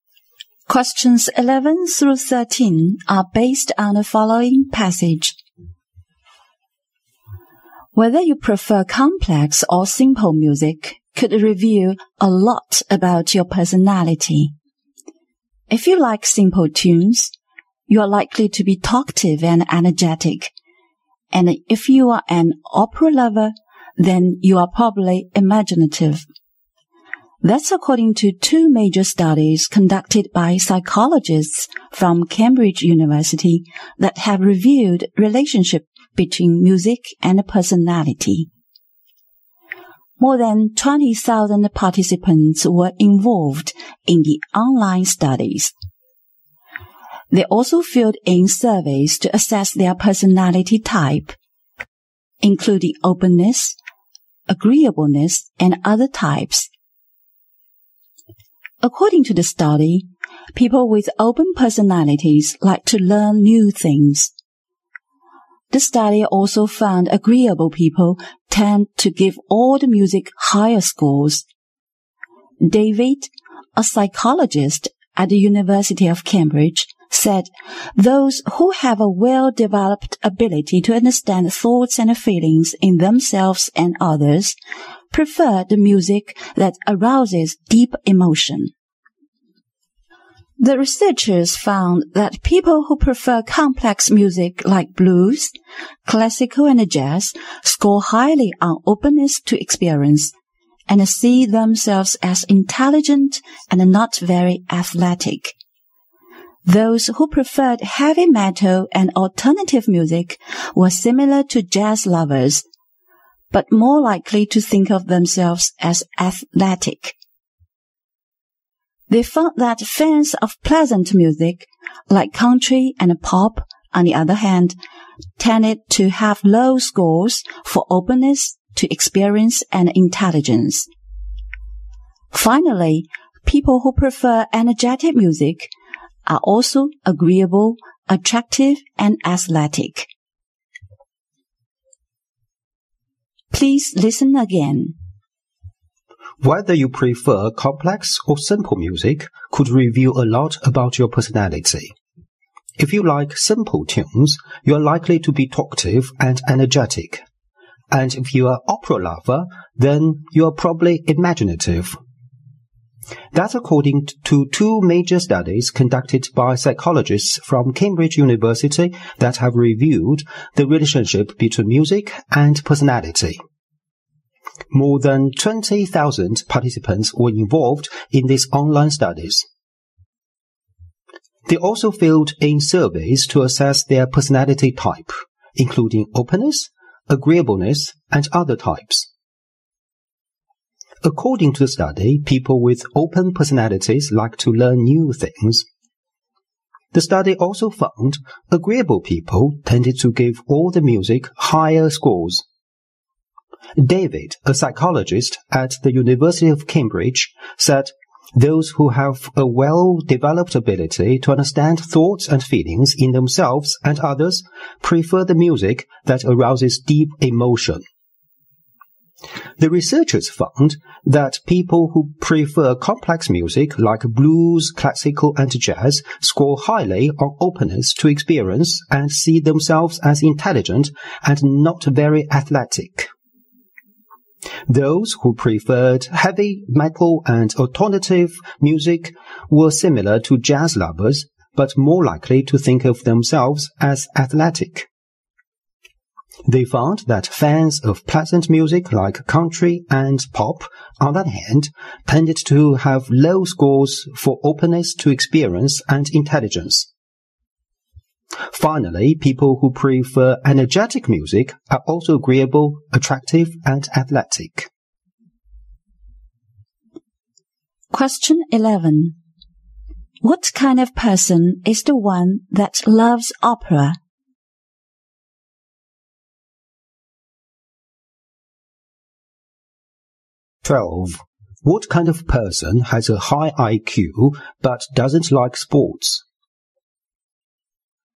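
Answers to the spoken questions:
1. An imaginative person
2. A person who prefers complex music like blues, classical and jazz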